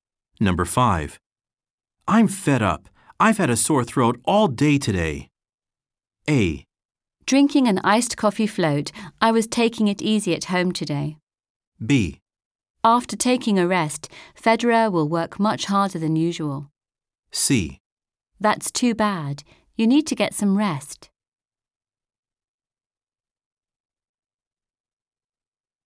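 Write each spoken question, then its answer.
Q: I'm fed up. I've had a sore throat all day today.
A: C: That's too bad. You need to get some rest.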